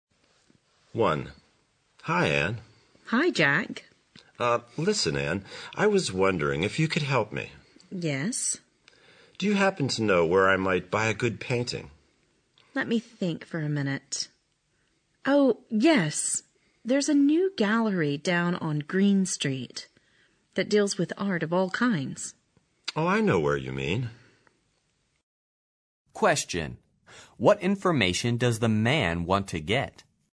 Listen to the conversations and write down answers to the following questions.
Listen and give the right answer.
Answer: He wants to know where he can buy a good painting.